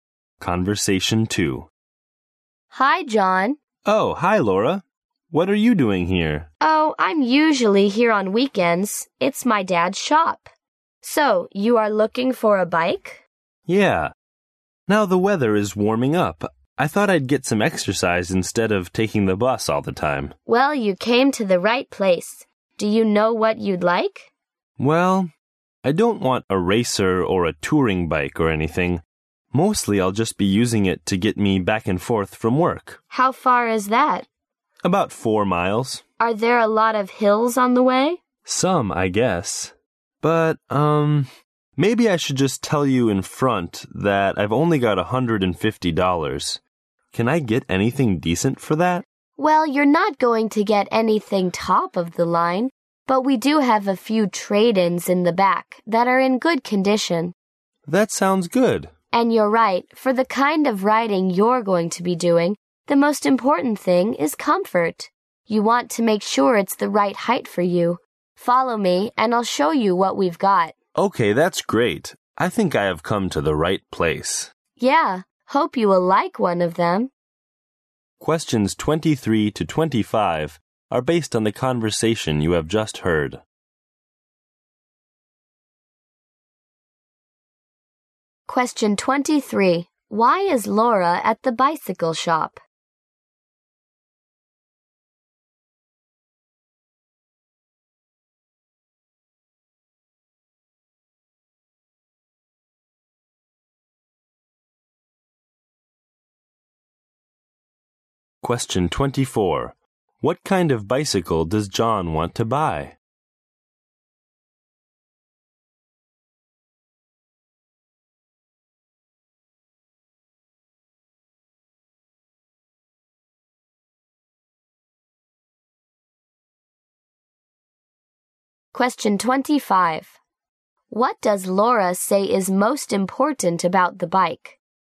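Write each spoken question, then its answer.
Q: Why is Laura at the bicycle shop?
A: It is her dad's shop and she's usually there on weekends.

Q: What kind of bicycle does John want to buy?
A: A cheap, simple bike for riding to work, not a racer or touring bike.

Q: What does Laura say is most important about the bike?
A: Comfort.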